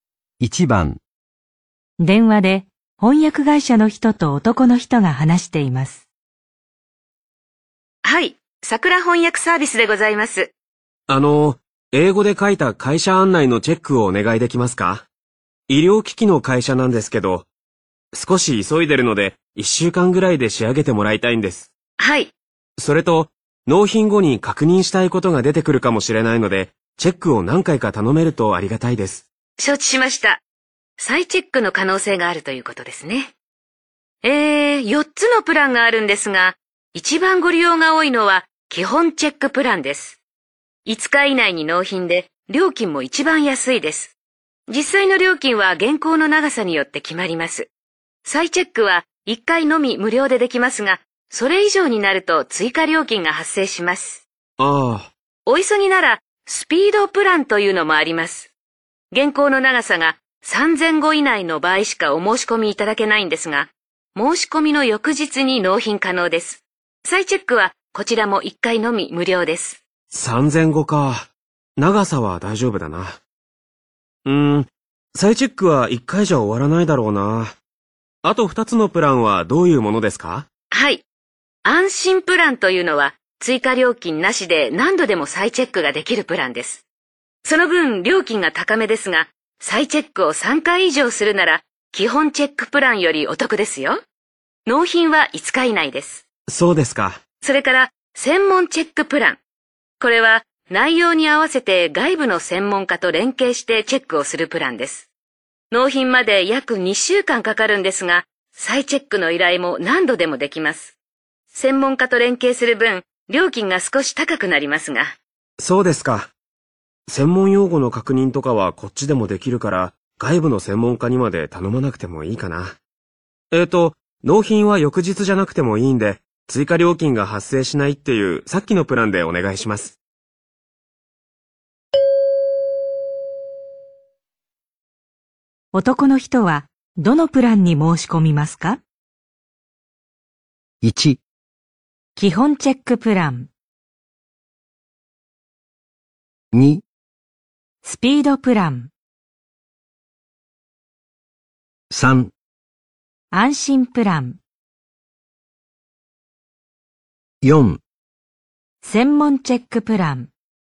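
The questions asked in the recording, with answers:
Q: 男の人は、どのプランに申し込みますか?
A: 3: 安心プラン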